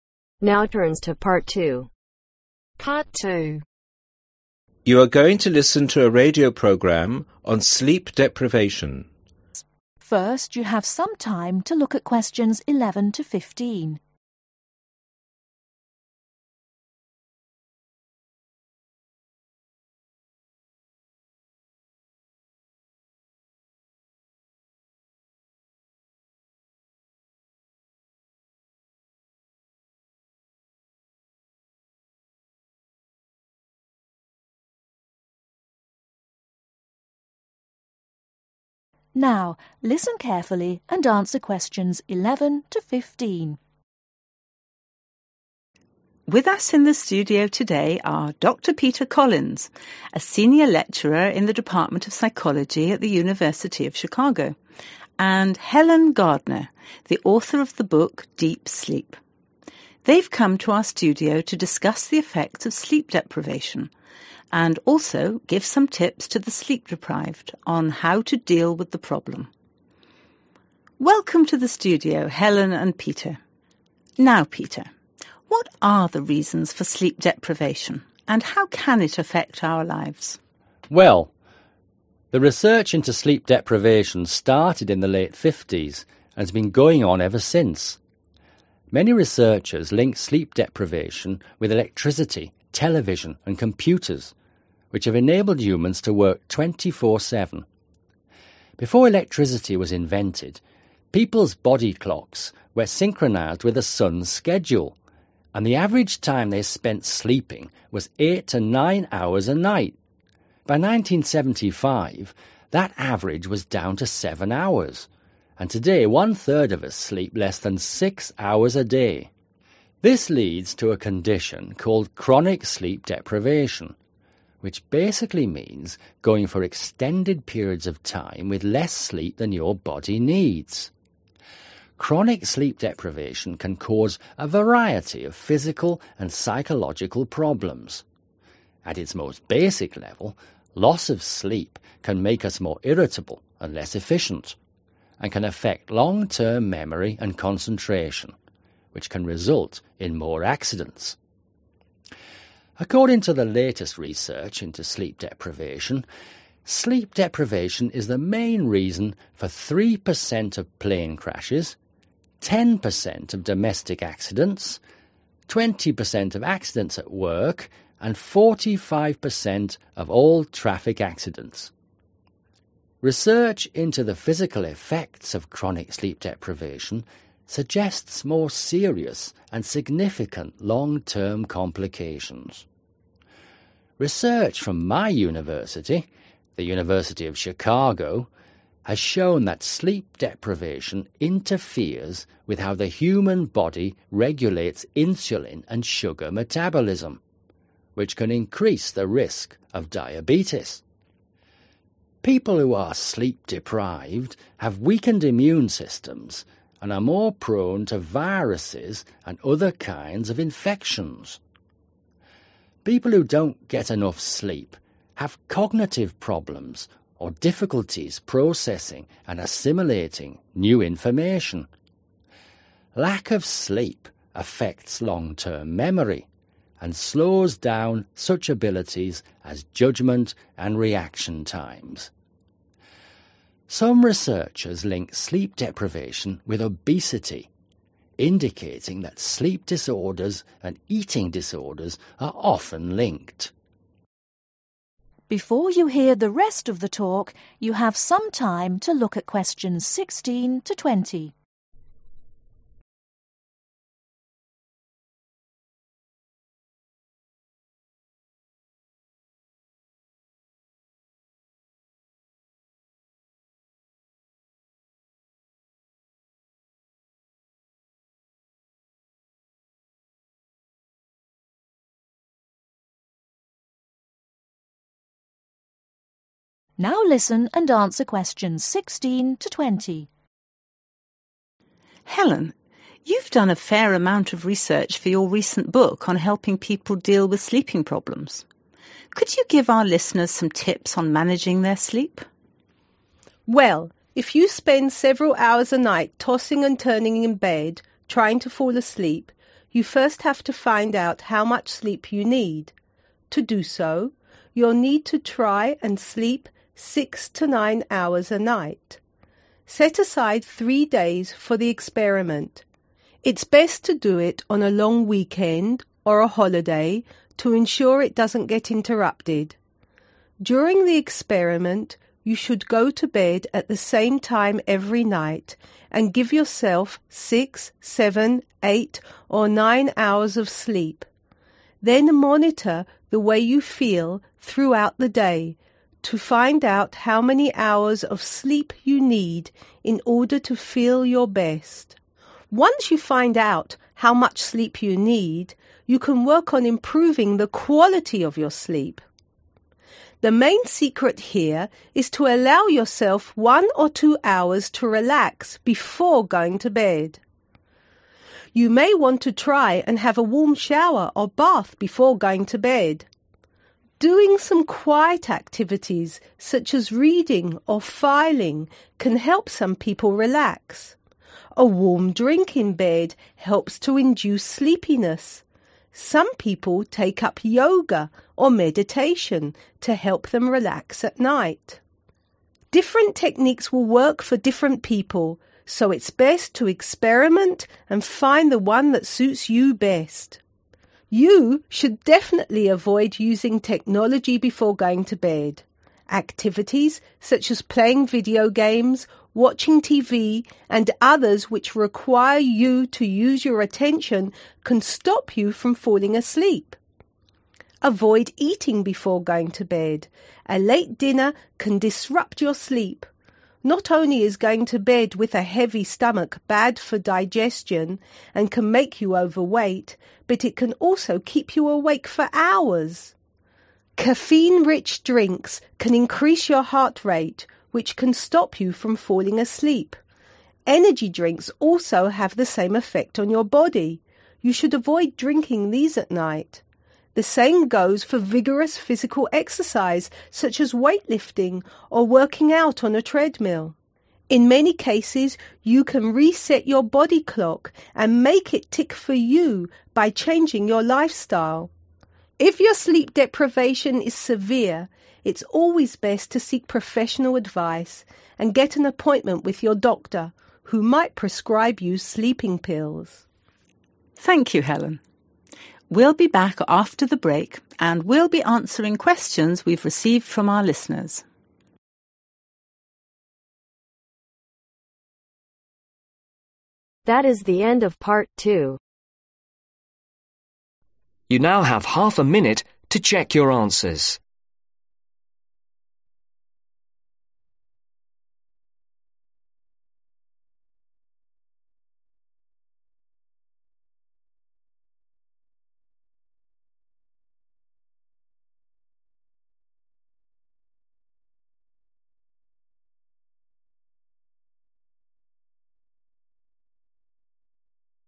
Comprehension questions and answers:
Choose THREE letters, A – E.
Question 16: - Have a warm shower or (16)............ before going to bed.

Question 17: - Do quiet activities such as reading or (17)............ .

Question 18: - Consider taking up yoga or (18)............ .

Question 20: Don't do intense (20)............ .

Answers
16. bath
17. filing
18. meditation
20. physical exercise